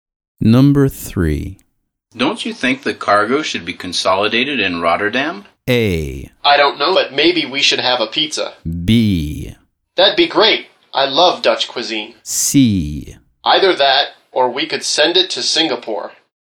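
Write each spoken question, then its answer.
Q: Don't you think the cargo should be consolidated in Rotterdam?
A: C: Either that, or we could send it to Singapore.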